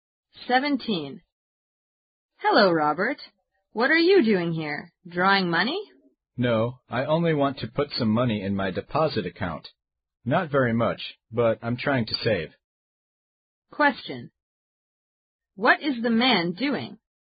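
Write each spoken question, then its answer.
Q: What is the man doing?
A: Putting money into his deposit account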